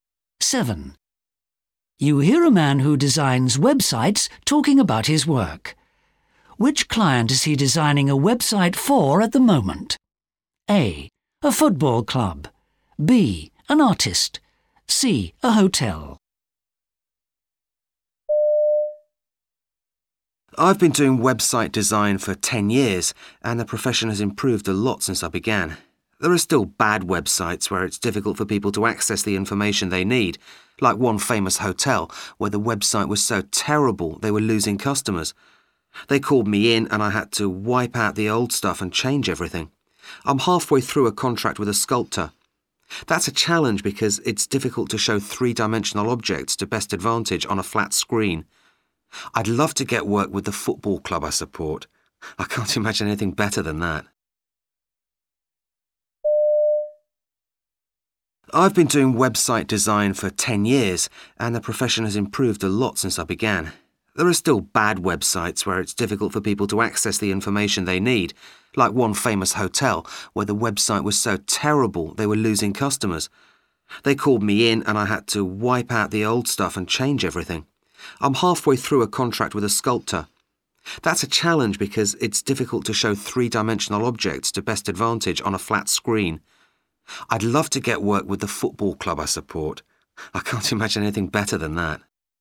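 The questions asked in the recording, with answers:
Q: Which client is he designing a website for at the moment?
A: B: An artist.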